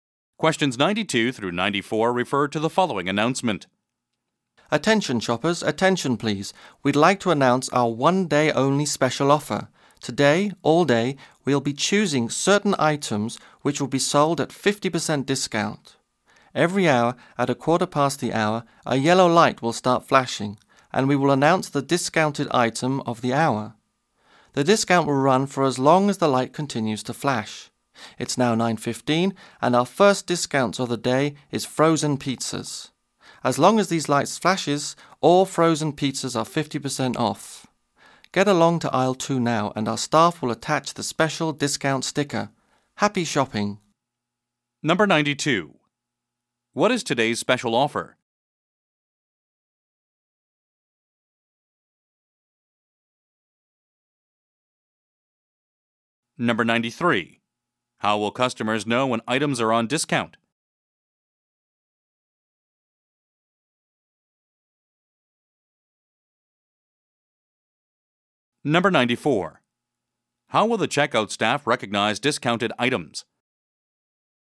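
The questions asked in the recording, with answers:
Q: What is today's special offer?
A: 50% off selected items every hour

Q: How will customers know when items are on discount?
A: A yellow light will flash and there will be an announcement

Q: How will the checkout staff recognize discounted items?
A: By a special discount sticker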